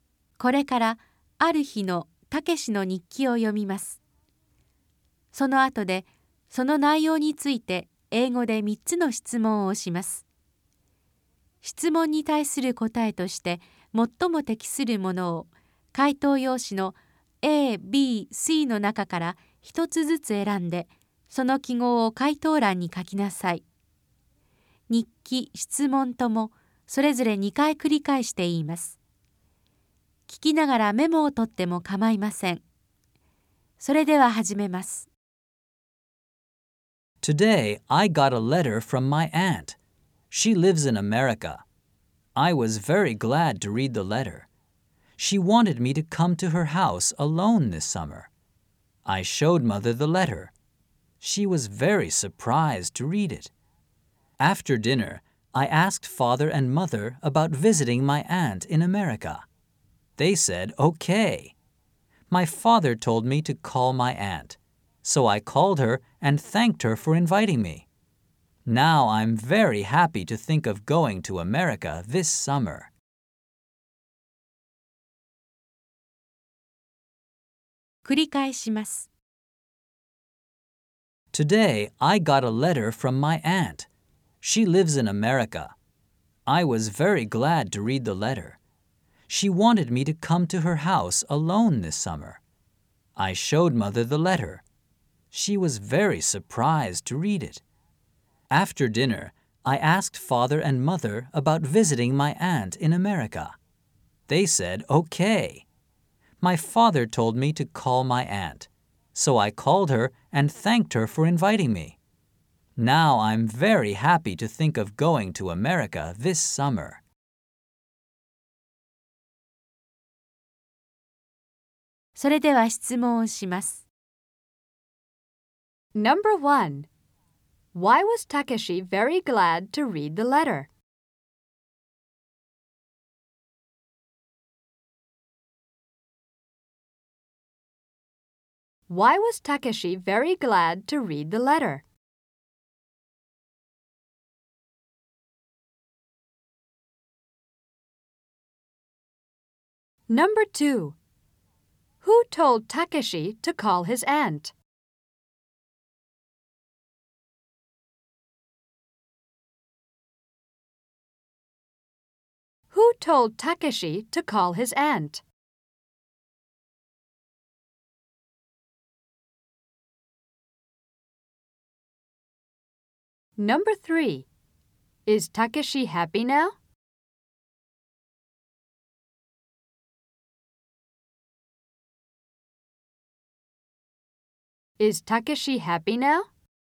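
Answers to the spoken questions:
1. Because his aunt invited him to come to her house in America this summer.
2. His father.
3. Yes, he is.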